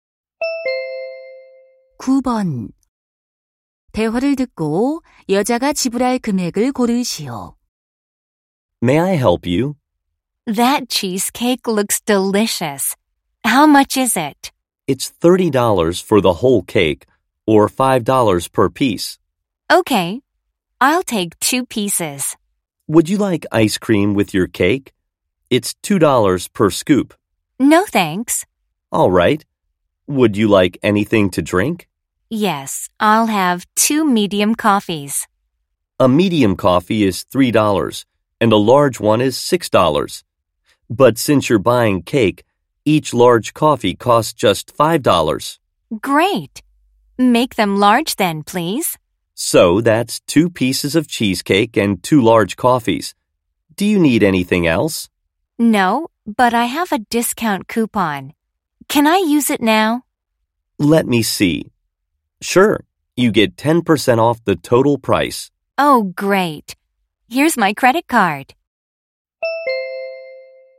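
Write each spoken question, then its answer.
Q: 대화를 듣고 여자가 지불할 금액을 고르시오.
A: 18달러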